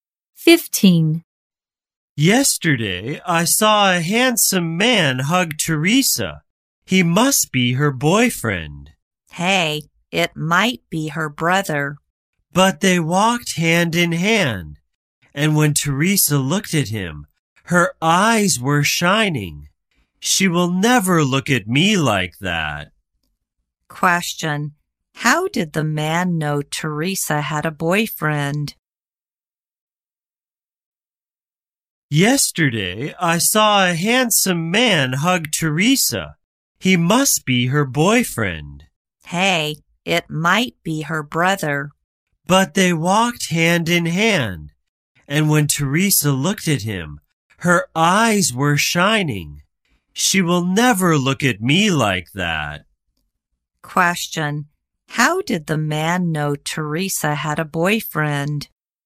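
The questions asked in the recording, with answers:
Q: Question, how did the man know Teresa had a boyfriend?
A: They walked hand in hand, and her eyes shone when she looked at him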